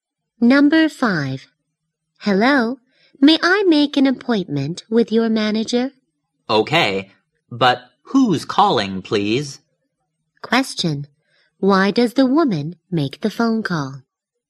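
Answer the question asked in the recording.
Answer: To make an appointment with the manager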